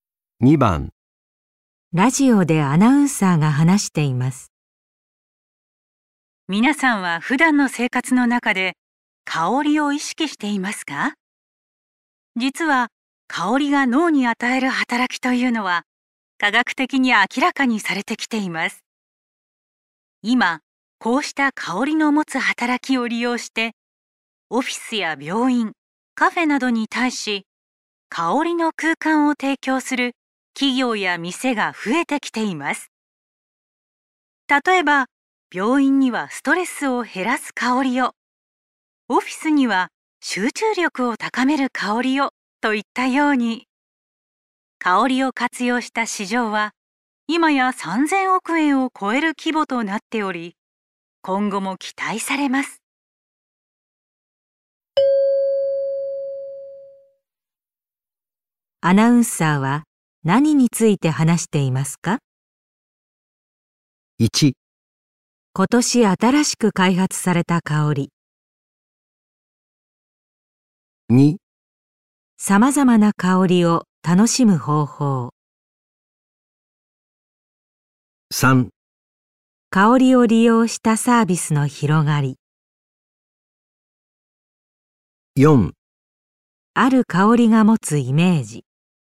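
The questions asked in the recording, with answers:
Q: アナウンサーは何について話していますか?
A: 3: 香りを利用したサービスの広がり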